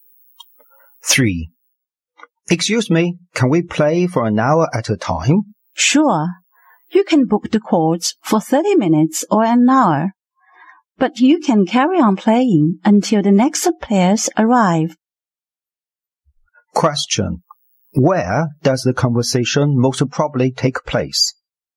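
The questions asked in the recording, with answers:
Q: Where does the conversation most probably take place?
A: At a sports court, such as a tennis court.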